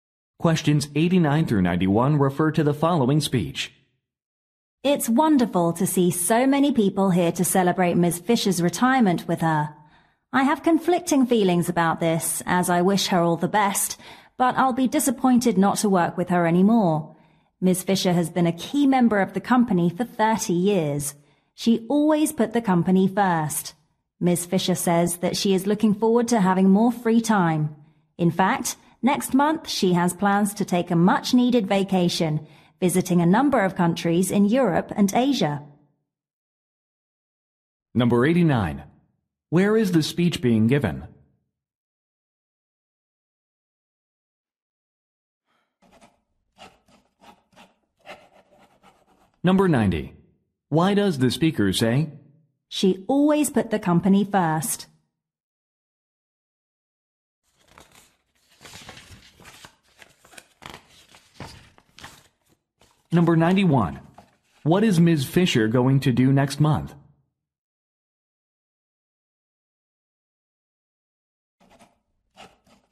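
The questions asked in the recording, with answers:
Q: Where is the speech being given?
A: At a retirement party

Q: What is Ms. Fisher going to do next month?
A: Take a vacation in Europe and Asia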